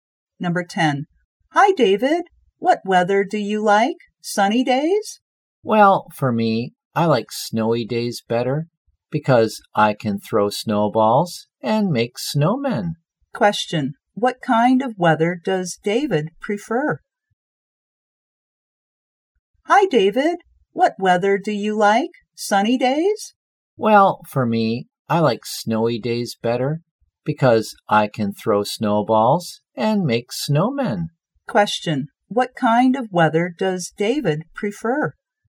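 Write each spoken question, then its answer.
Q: What kind of weather does David prefer?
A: Snowy days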